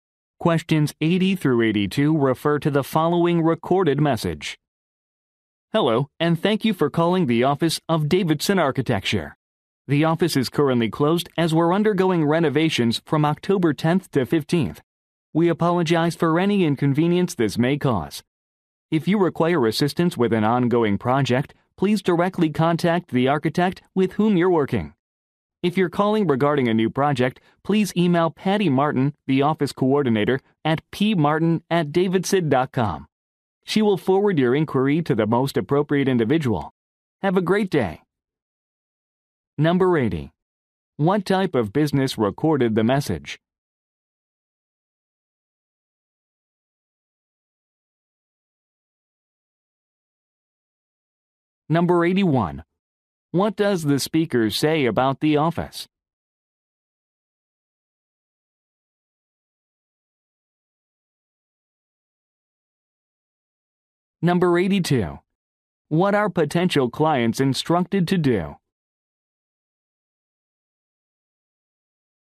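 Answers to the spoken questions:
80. An architecture firm
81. It is closed for renovations
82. Email the office coordinator, Patty Martin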